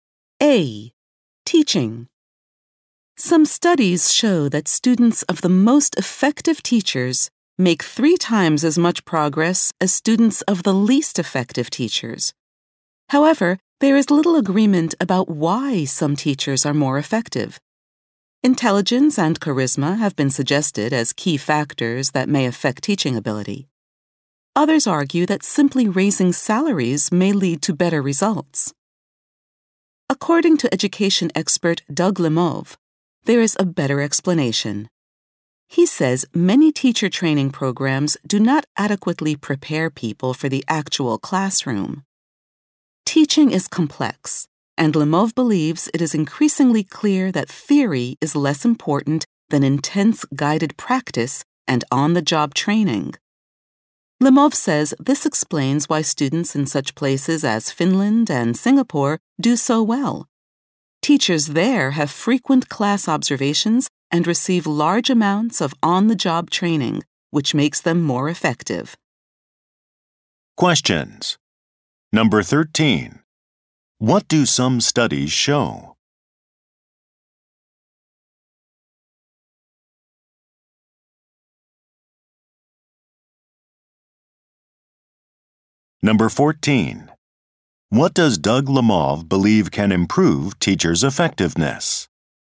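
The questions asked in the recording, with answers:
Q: What do some studies show?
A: Students of the most effective teachers progress three times as much as those of the least effective

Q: What does Doug Lamov believe can improve teachers' effectiveness?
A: Intense guided practice and on-the-job training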